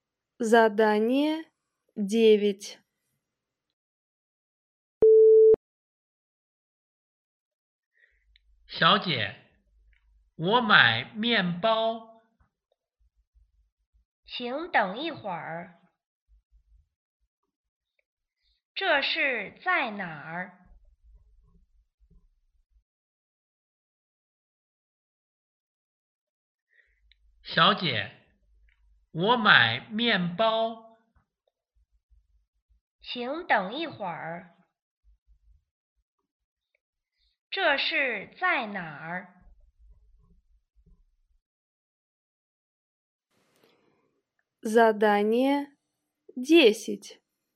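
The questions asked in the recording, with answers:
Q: 这是在哪儿?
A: 商店(面包店)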